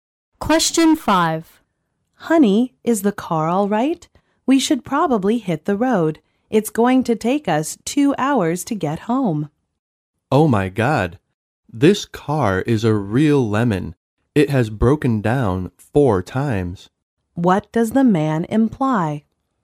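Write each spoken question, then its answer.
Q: What does the man imply?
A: The car is unreliable and has broken down again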